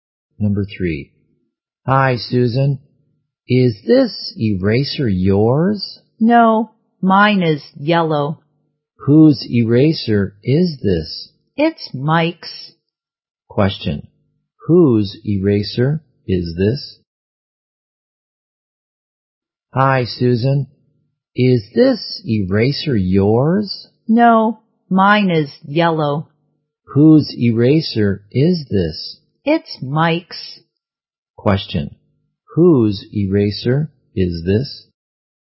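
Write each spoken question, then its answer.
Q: Question. Whose eraser is this?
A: Mike's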